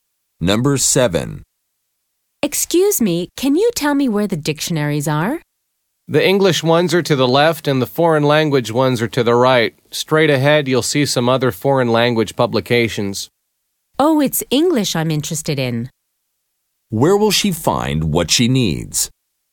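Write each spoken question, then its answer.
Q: Where will she find what she needs?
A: To the left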